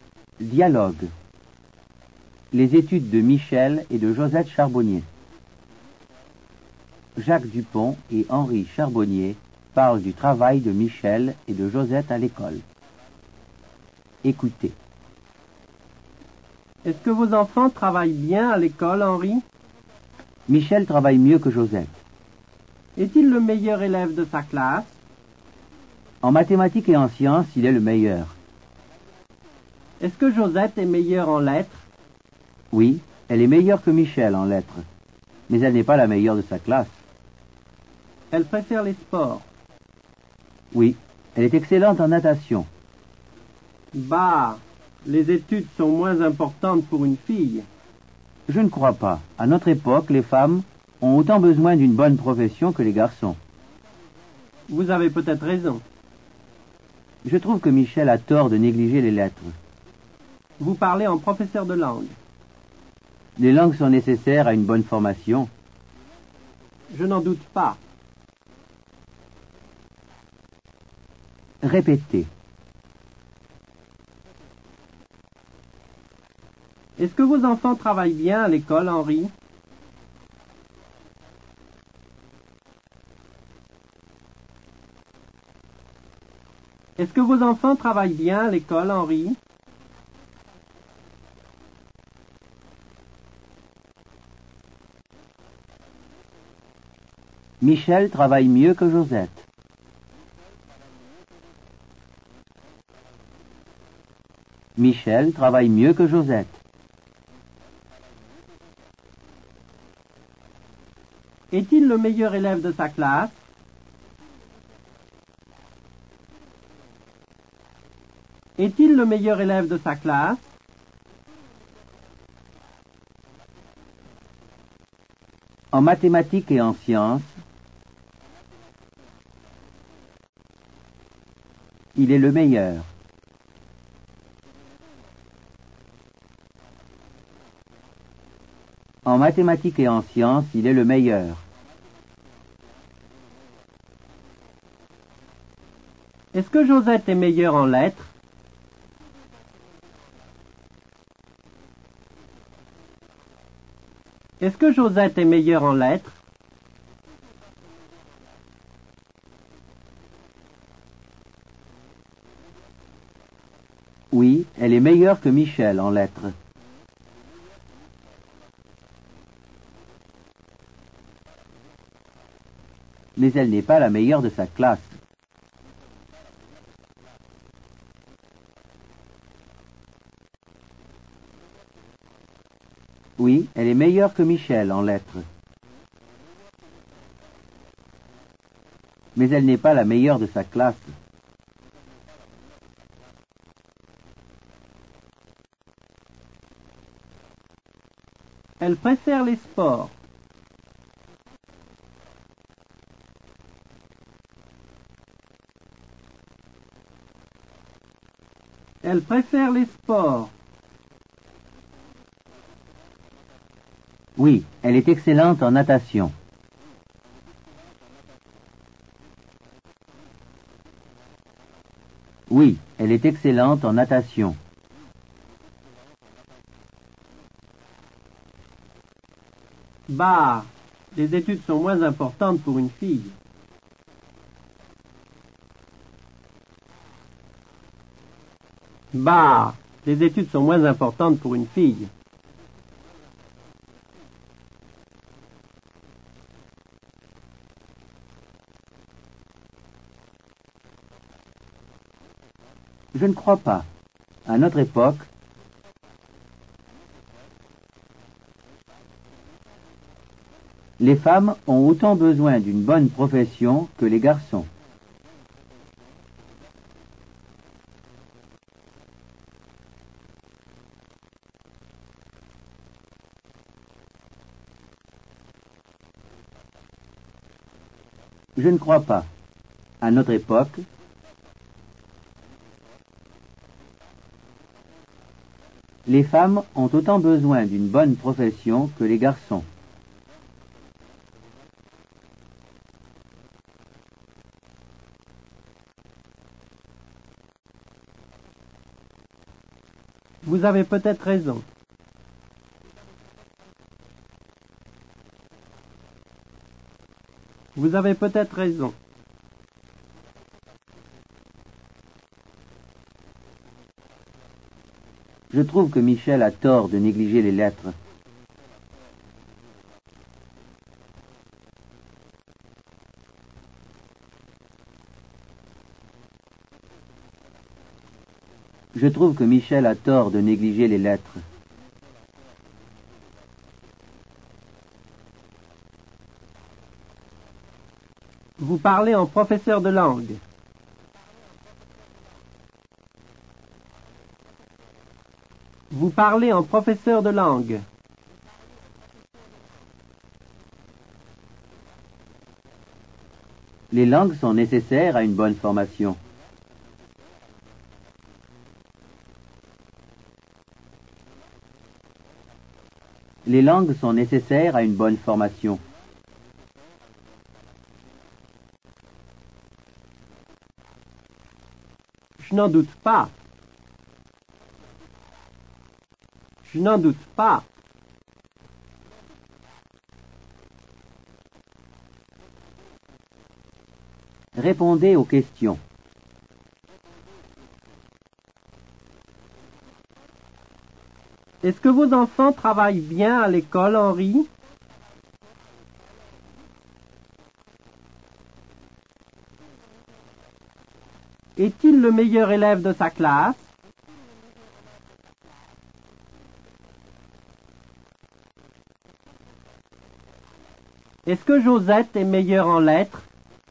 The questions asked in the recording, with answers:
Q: Est-ce que vos enfants travaillent bien à l'école, Henri?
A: Michel travaille mieux que Josette.

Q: Est-il le meilleur élève de sa classe?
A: En mathématiques et en sciences, il est le meilleur.

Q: Est-ce que Josette est meilleure en lettres?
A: Oui, elle est meilleure que Michel en lettres, mais elle n'est pas la meilleure de sa classe.